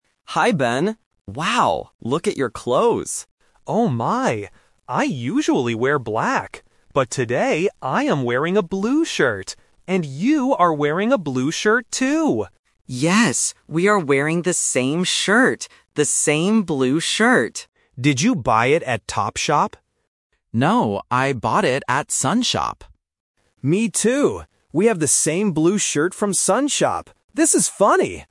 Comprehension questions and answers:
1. What clothes are the two friends talking about?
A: Shirts.

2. What color are their shirts today?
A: Blue.

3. Where did Alex buy his shirt?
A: Sun Shop.

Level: A1